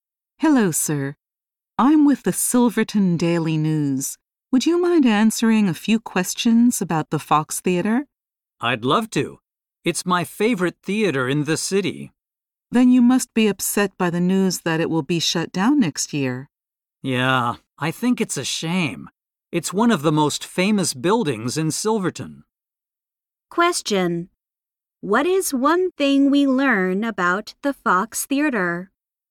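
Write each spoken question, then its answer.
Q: What is one thing we learn about the Fox Theater?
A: It will be shut down next year.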